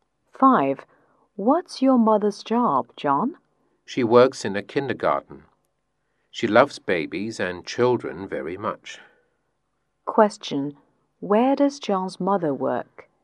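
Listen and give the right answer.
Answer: In a kindergarten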